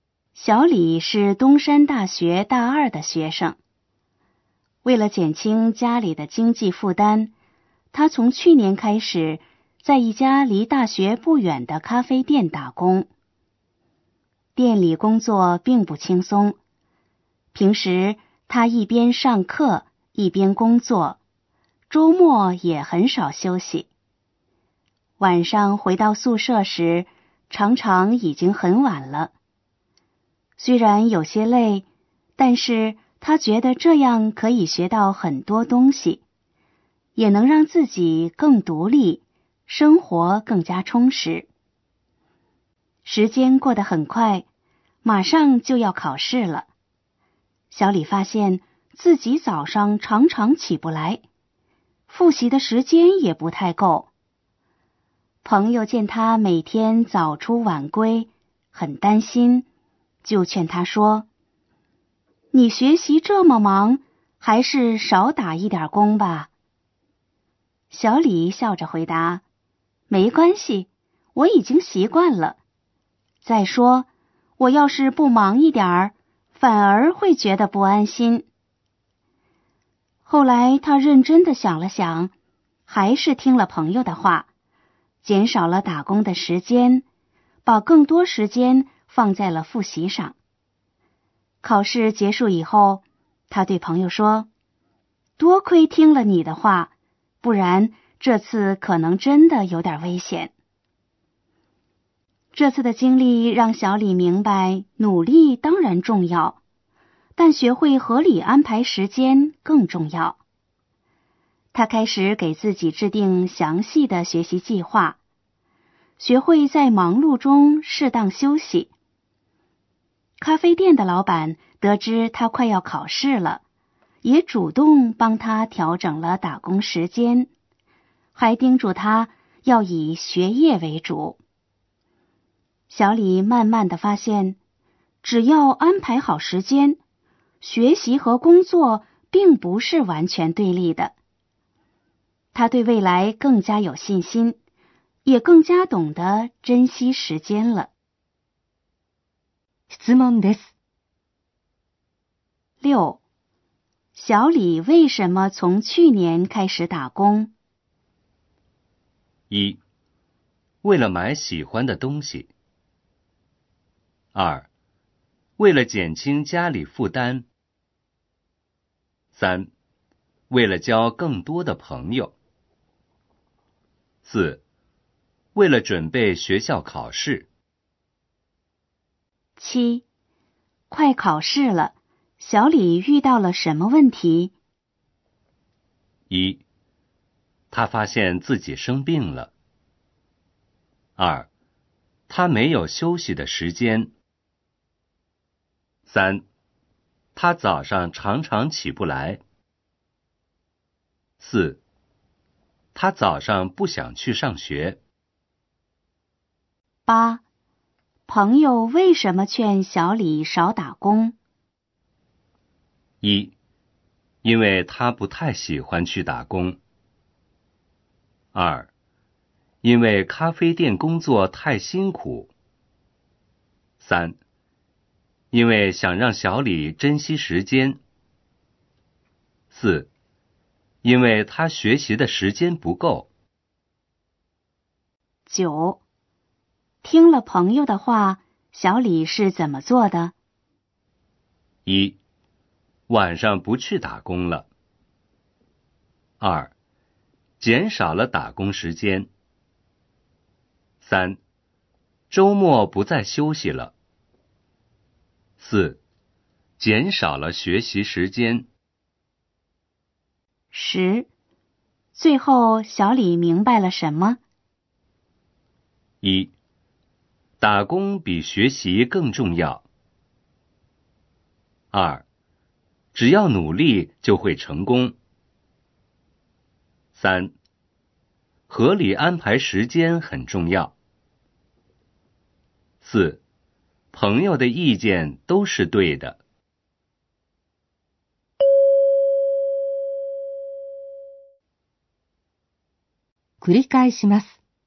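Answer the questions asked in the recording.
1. 2: 为了减轻家里负担。
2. 3: 他早上常常起不来。
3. 4: 因为他学习的时间不够。
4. 2: 减少了打工时间。
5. 3: 合理安排时间很重要。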